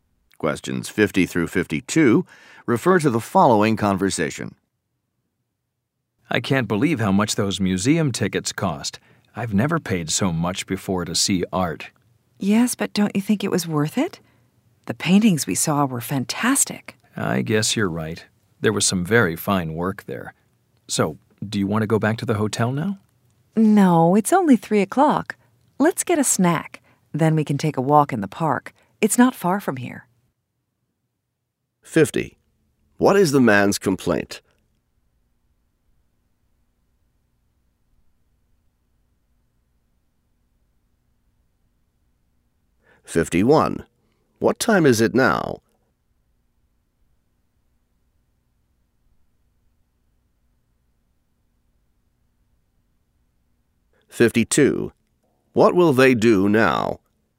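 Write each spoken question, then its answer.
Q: What is the man's complaint?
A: The museum tickets cost too much

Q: What time is it now?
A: 3 o'clock

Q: What will they do now?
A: Get a snack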